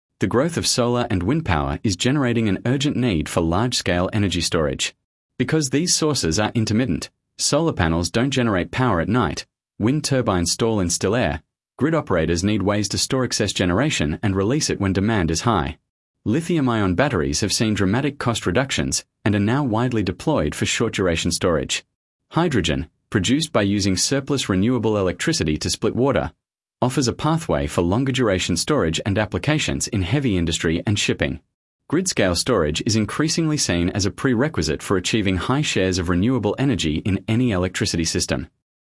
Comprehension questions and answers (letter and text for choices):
Task reminder: Read all options before the audio starts. Select the paragraph that best summarises the recording. The correct answer matches the main idea and tone, not just one detail.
Sample Text 1 — Renewable Energy Storage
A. A. Renewable energy is fundamentally unreliable and cannot replace fossil fuels without significant investment in storage technology.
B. B. Because solar and wind power is intermittent, energy storage is a critical challenge, with batteries and hydrogen among the technologies being developed.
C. C. Battery prices have fallen so dramatically that the storage problem for renewable energy has already been solved.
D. D. The intermittency of renewable energy means that nuclear power is the only viable low-carbon alternative to fossil fuels.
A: B. B. Because solar and wind power is intermittent, energy storage is a critical challenge, with batteries and hydrogen among the technologies being developed.